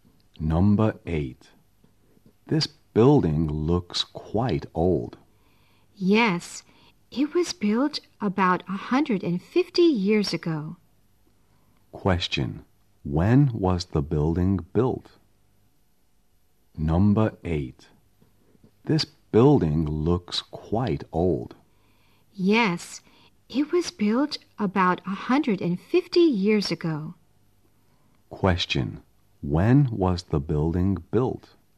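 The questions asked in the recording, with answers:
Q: Question, when was the building built?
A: About 150 years ago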